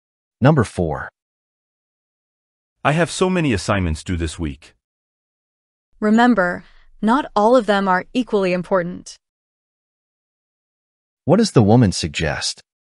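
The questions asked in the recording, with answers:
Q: What does the woman suggest?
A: He should do the most important assignments first.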